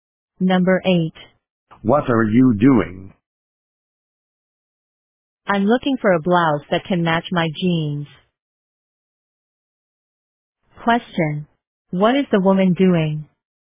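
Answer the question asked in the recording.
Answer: Looking for a blouse to match her jeans.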